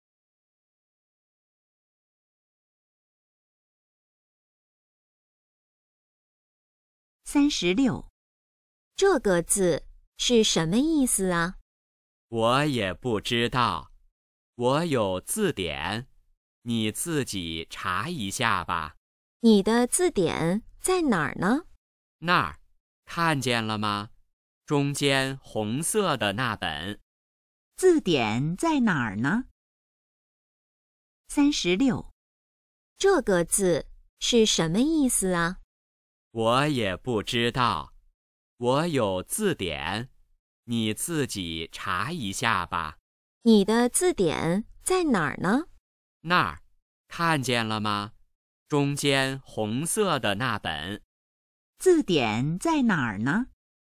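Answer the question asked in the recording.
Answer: 中间(红色的那本)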